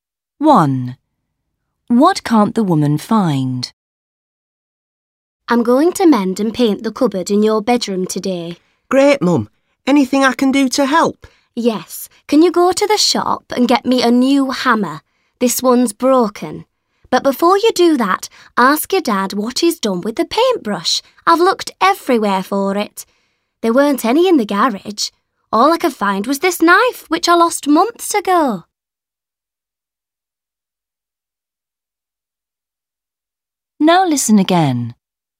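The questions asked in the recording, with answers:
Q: What can't the woman find?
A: the paintbrush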